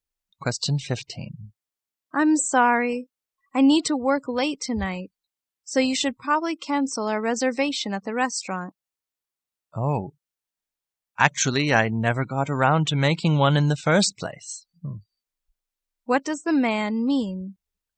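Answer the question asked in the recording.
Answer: He never made the reservation.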